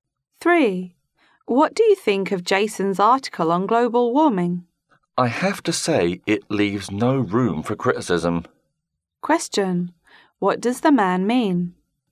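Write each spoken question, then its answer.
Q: What does the man mean?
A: Jason's article is excellent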